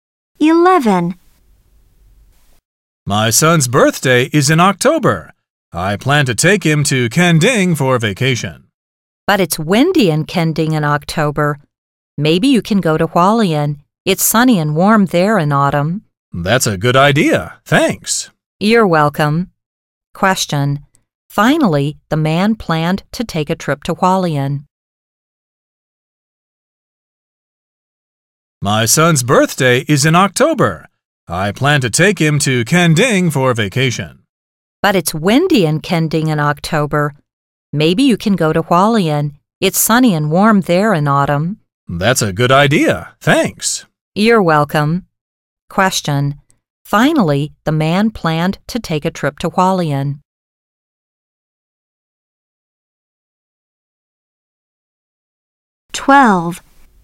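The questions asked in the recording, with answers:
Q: Finally, the man planned to take a trip to Hualien.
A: A: true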